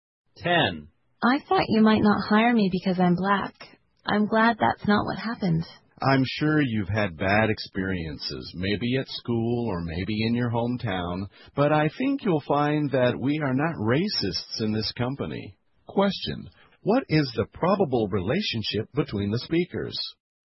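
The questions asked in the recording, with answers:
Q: What is the probable relationship between the speakers?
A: Employer and new employee.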